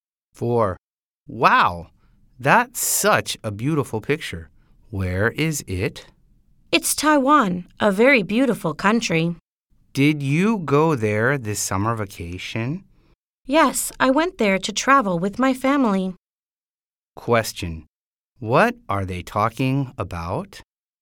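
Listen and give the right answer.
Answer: A picture of Taiwan from a summer trip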